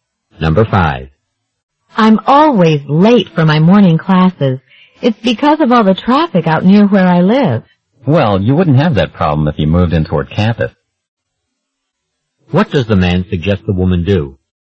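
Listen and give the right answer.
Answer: Move closer to campus.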